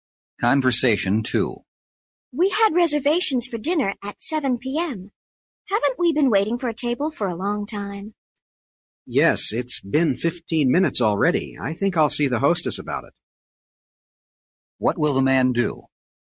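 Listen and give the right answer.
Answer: Talk to the hostess about the table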